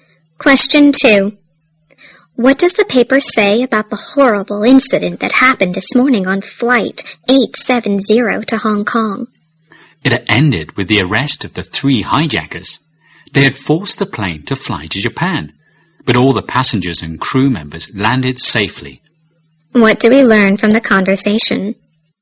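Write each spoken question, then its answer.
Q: What do we learn from the conversation?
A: The hijackers were arrested and everyone on the plane landed safely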